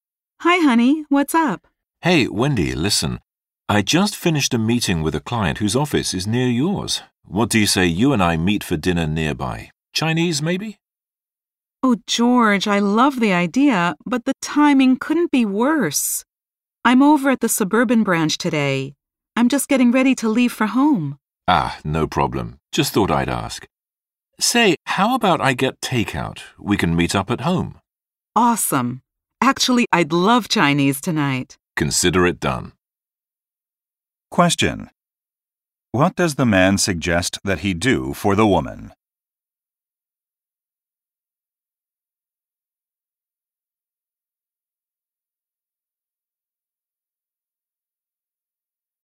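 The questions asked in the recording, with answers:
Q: What does the man suggest that he do for the woman?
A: Get Chinese takeout and meet her at home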